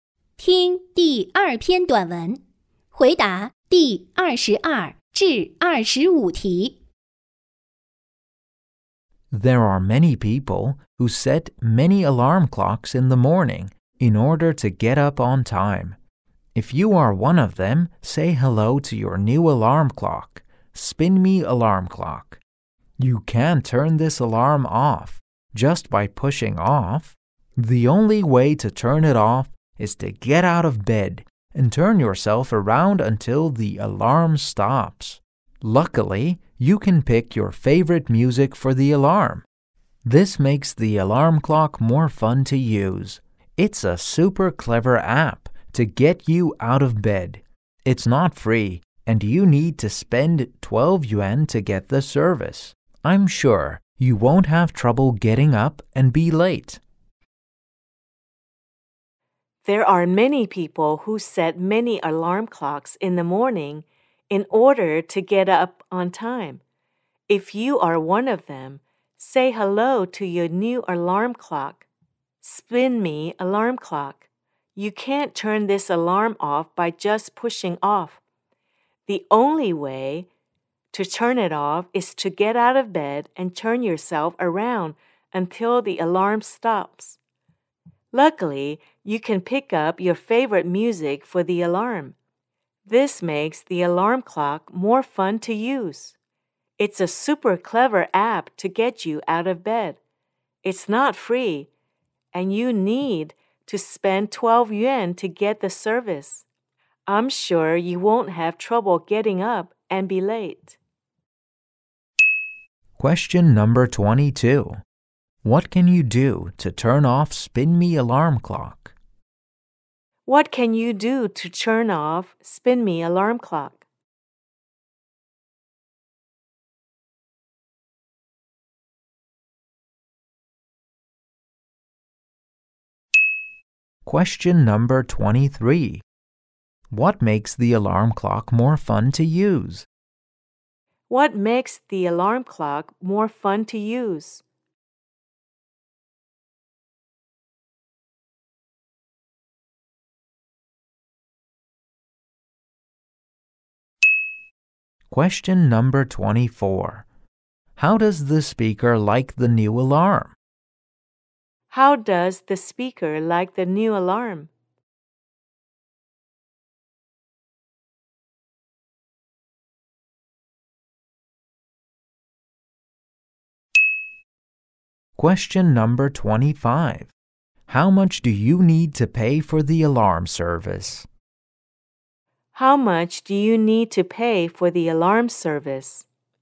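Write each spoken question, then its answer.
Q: What can you do to turn off Spin Me Alarm Clock?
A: Get out of bed and turn yourself around until it stops.

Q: What makes the alarm clock more fun to use?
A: You can pick your favorite music for the alarm.

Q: How much do you need to pay for the alarm service?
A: 12 yuan.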